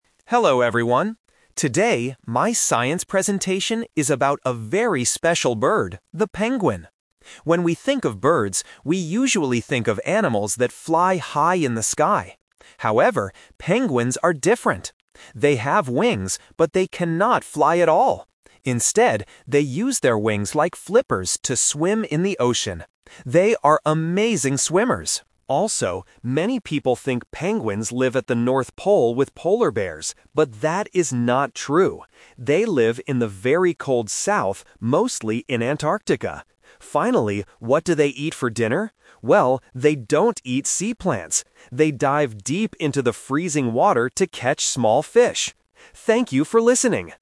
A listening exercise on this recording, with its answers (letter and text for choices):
Listen to a student giving a science presentation and choose the correct answer (A, B, or C).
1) What do penguins use their wings for?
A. To fly in the sky.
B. To swim in the ocean.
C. To walk on the ice.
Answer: B. To swim in the ocean.

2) Where do penguins actually live?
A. At the North Pole.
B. In warm countries.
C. In Antarctica.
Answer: C. In Antarctica.

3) What is the penguin's main food?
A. Fish.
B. Sea plants.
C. Polar bears.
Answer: A. Fish.

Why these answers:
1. The student says, "they use their wings like flippers to swim in the ocean." Option (A) is the trap; the student mentions that birds usually "fly high in the sky," but immediately clarifies that penguins "cannot fly at all." Option (C) is not mentioned in the audio.
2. The student clearly states that penguins live "mostly in Antarctica." Option (A) is the trap; the student says "many people think" they live at the North Pole, "But that is not true" (The Twist). Option (B) is incorrect and not mentioned.
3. At the end of the presentation, the student says they dive into the water to "catch small fish." Option (B) is the trap; the speaker explicitly mentions "they don't eat sea plants." Option (C) is a distractor because "polar bears" were mentioned earlier in a different context, not as food.

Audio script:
Student: Hello everyone. Today, my science presentation is about a very special bird: the penguin. When we think of birds, we usually think of animals that fly high in the sky. However, penguins are different. They have wings, but they cannot fly at all! Instead, they use their wings like flippers to swim in the ocean. They are amazing swimmers. Also, many people think penguins live at the North Pole with polar bears. But that is not true. They live in the very cold south, mostly in Antarctica. Finally, what do they eat for dinner? Well, they don't eat sea plants. They dive deep into the freezing water to catch small fish. Thank you for listening!